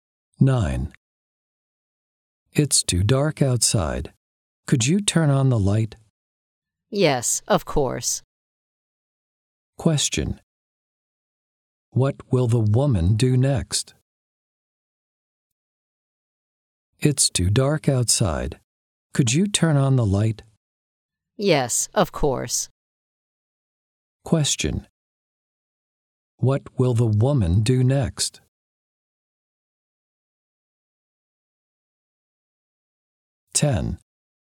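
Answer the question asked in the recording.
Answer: Turn on the light.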